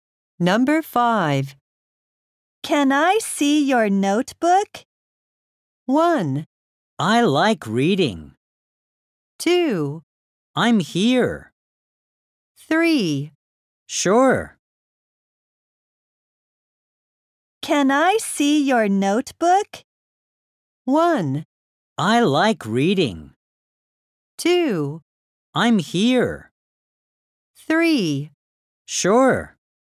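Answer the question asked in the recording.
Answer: 3: Sure.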